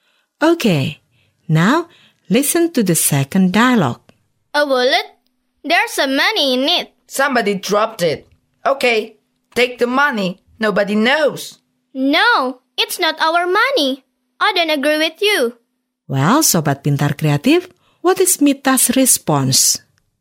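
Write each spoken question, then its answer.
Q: Well, Sobat Pintar Kreatif, what is Mita's response?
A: Disagreeing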